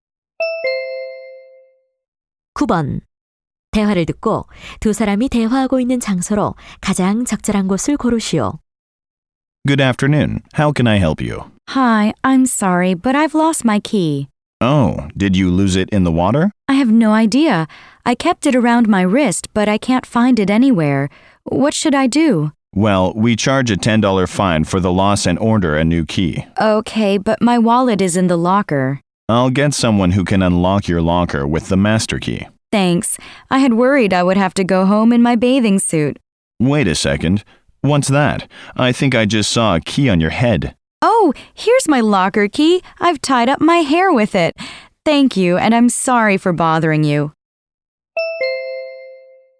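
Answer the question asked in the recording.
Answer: 수영장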